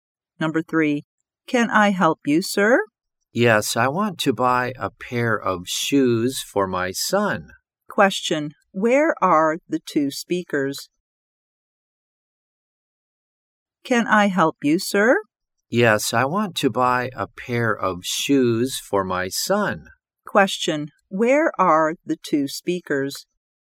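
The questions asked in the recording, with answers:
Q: where are the two speakers?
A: In a shoe shop.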